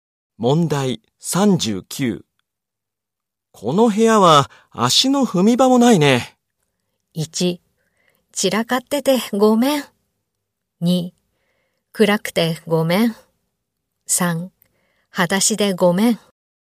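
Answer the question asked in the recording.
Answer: 1: 散らかっててごめん。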